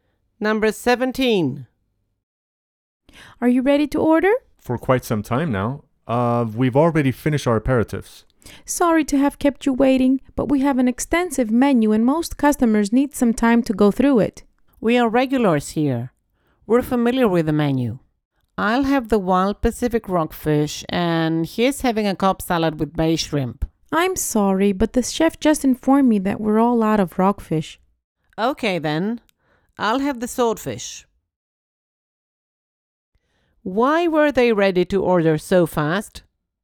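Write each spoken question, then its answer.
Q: Why were they ready to order so fast?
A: They are regulars and already know the menu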